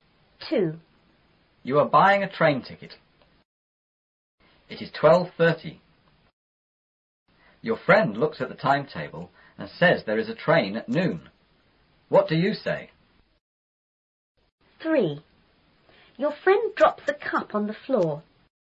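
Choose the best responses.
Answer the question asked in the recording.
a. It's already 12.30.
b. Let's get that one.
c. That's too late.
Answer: a. It's already 12.30.

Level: 初中英语广州版4B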